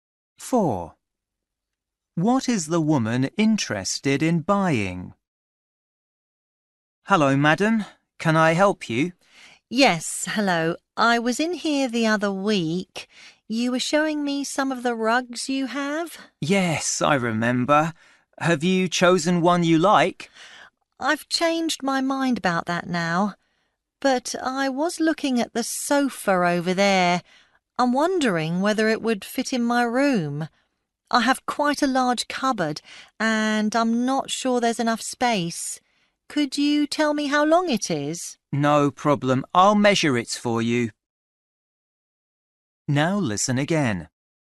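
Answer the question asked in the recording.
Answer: A sofa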